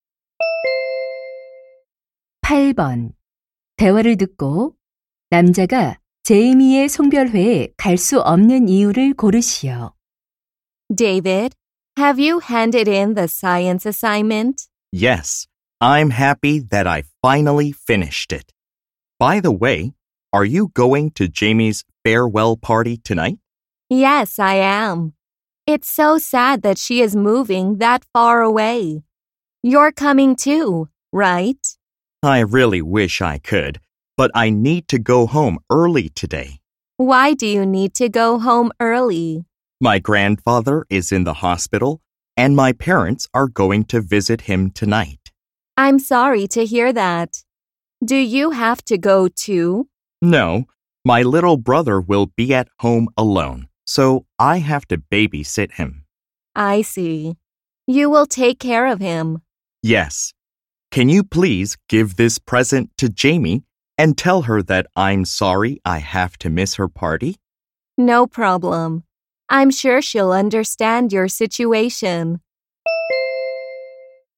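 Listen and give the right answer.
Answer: 남동생을 돌봐야 해서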